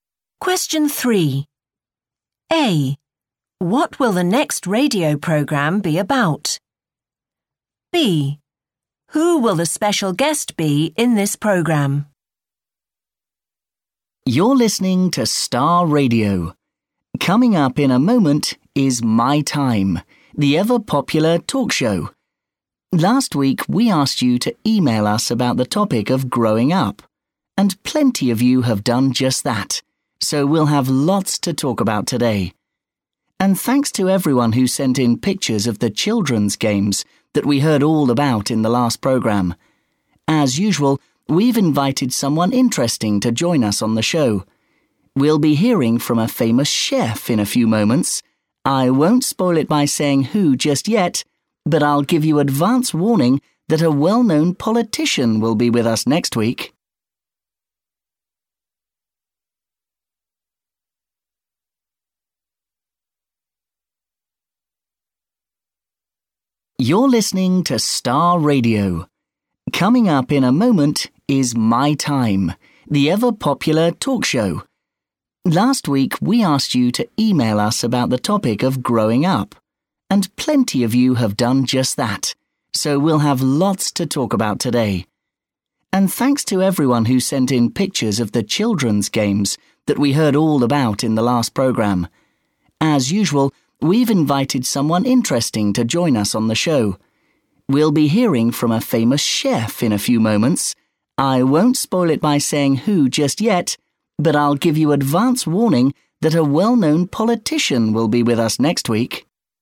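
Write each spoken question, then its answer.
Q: What will the next radio programme be about?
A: growing up

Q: Who will the special guest be in this programme?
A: a famous chef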